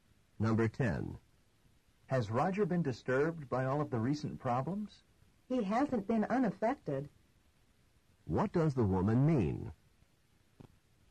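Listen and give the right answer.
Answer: Roger has been affected by the problems.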